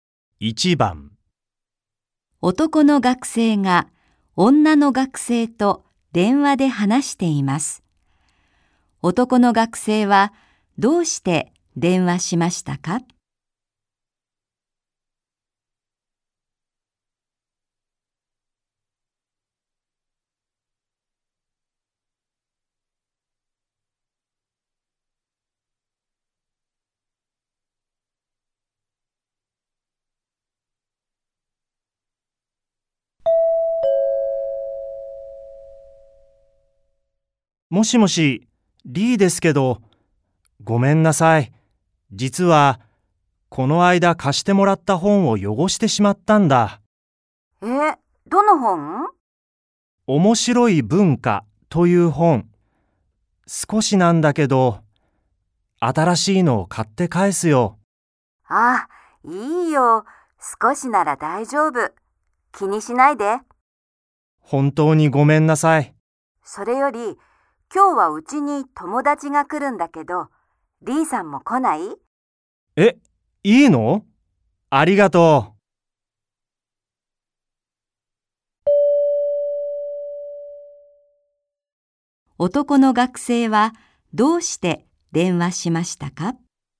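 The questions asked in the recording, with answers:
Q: 男の学生はどうして電話しましたか?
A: 借りた本を汚してしまったことを謝るため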